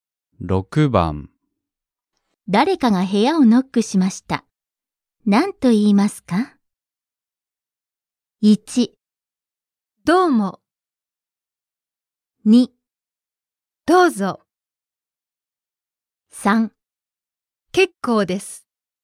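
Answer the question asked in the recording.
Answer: 2: どうぞ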